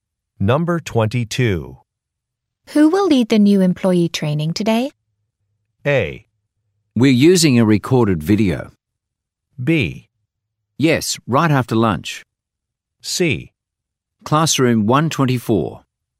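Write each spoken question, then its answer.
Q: Who will lead the new employee training today?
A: A: We're using a recorded video.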